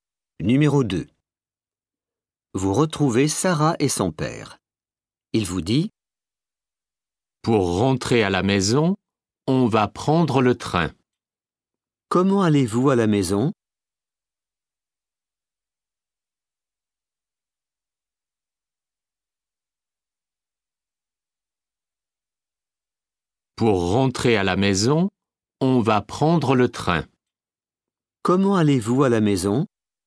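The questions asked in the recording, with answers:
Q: Comment allez-vous à la maison?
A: En train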